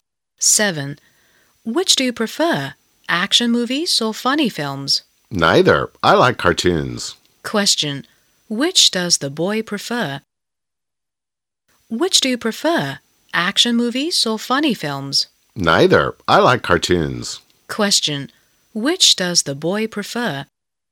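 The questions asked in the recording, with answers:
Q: Which does the boy prefer?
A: Cartoons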